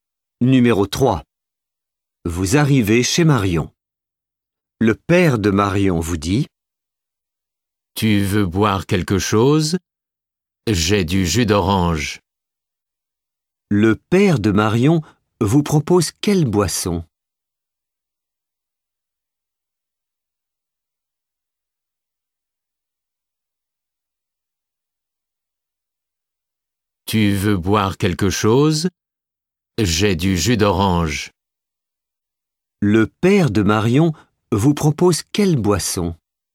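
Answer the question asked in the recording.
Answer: Du jus d'orange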